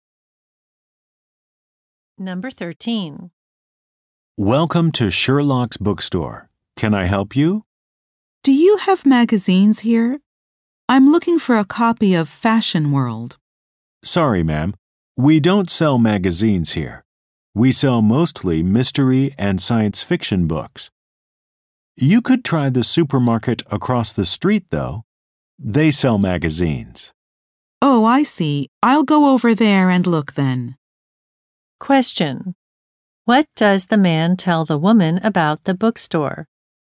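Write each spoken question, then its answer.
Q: What does the man tell the woman about the bookstore?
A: It doesn't sell magazines.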